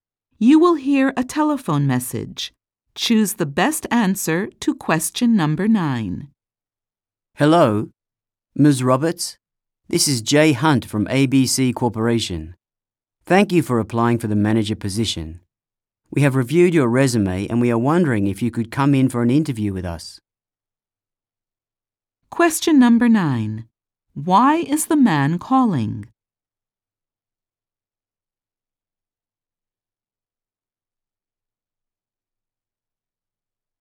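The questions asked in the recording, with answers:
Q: Why is the man calling?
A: To invite Ms. Roberts to an interview for the manager position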